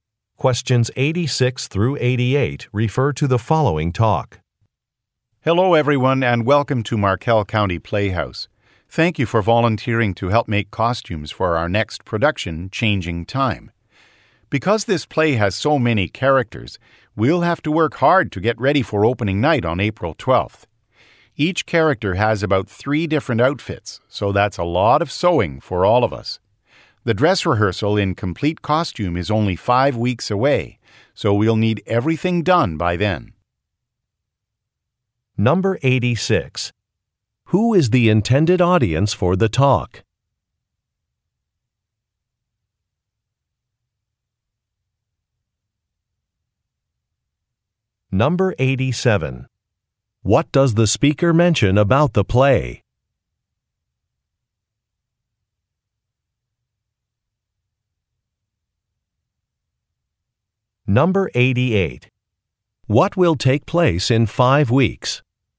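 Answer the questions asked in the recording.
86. Volunteers making costumes
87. It has many characters
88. The dress rehearsal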